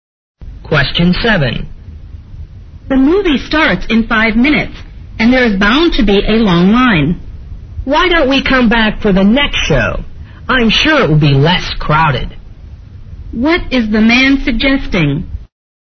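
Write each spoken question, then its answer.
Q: What is the man suggesting?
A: Coming back for the next show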